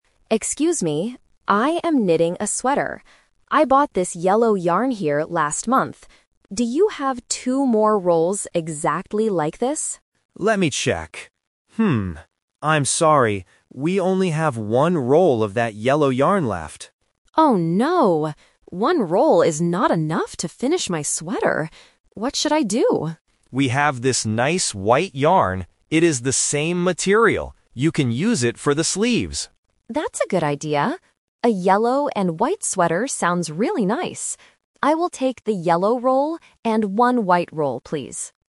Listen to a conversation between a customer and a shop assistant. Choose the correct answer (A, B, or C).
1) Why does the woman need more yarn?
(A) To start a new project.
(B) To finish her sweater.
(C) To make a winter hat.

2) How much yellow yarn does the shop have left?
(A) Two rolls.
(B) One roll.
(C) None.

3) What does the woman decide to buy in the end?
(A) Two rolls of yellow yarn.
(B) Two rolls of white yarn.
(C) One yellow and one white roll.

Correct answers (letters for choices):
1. B
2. B
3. C

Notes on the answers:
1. Emma says clearly: "One roll is not enough to finish my sweater."
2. Tom checks the stock and says: "We only have one roll of that yellow yarn left."
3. Emma agrees with Tom's idea and says: "I will take the yellow roll and one white roll, please."

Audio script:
Emma: Excuse me. I am knitting a sweater. I bought this yellow yarn here last month. Do you have two more rolls exactly like this?
Tom: Let me check. I'm sorry. We only have one roll of that yellow yarn left.
Emma: Oh no. One roll is not enough to finish my sweater. What should I do?
Tom: We have this nice white yarn. It is the same material. You can use it for the sleeves.
Emma: That's a good idea! A yellow and white sweater sounds really nice. I will take the yellow roll and one white roll, please.